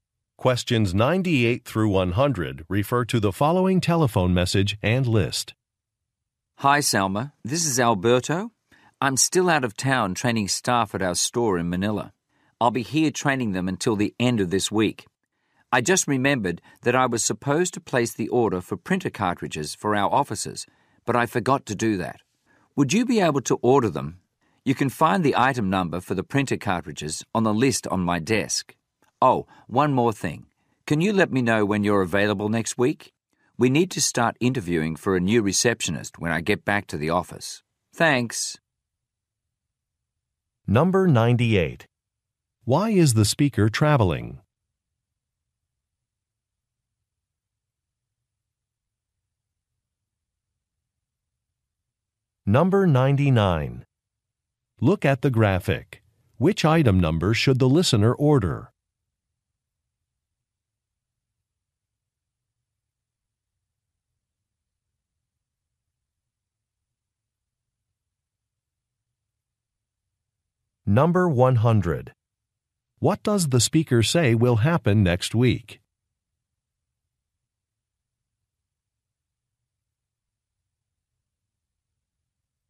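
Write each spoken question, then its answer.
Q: Why is the speaker traveling?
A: To train staff at the Manila store

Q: What does the speaker say will happen next week?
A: Interviews for a new receptionist will start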